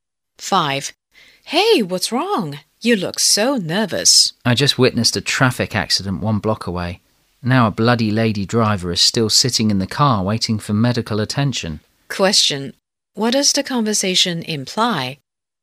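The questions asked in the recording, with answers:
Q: What does the conversation imply?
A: A woman driver was injured in a traffic accident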